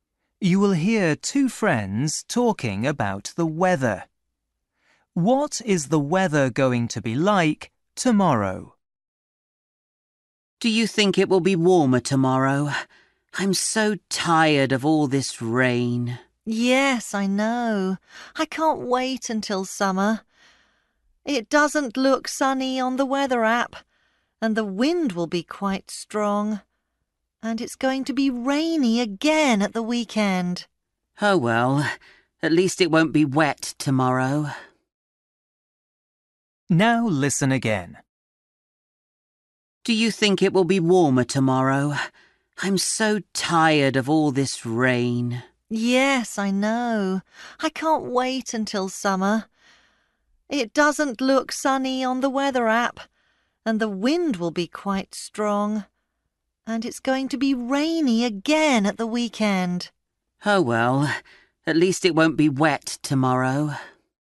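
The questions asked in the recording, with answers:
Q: What is the weather going to be like tomorrow?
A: Dry but windy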